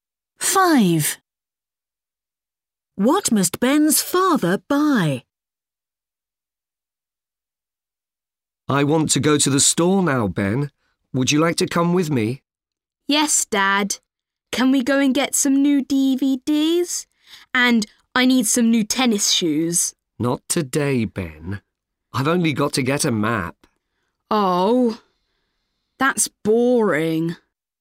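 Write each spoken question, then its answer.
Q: What must Ben's father buy?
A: A map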